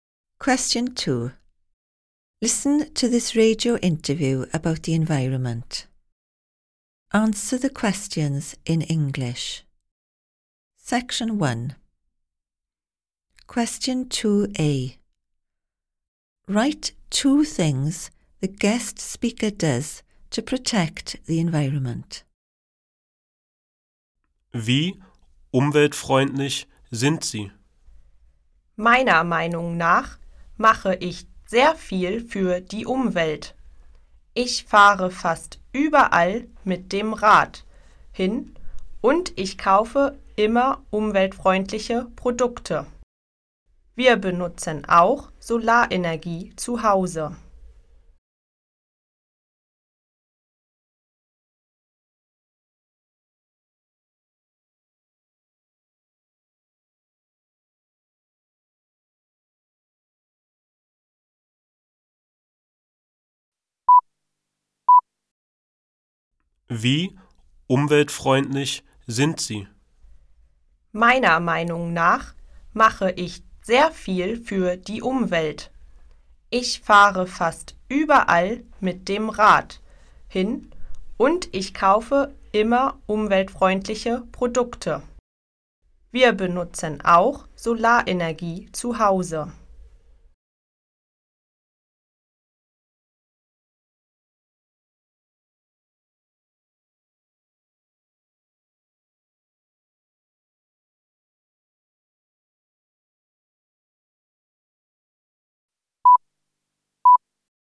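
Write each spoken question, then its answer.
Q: Write 2 things the guest speaker does to protect the environment.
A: Cycles almost everywhere; buys environmentally friendly products; uses solar energy at home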